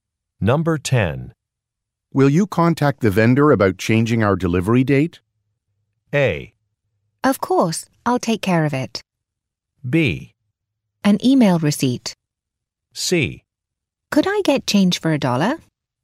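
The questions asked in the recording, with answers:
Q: Will you contact the vendor about changing our delivery date?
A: A: Of course, I'll take care of it.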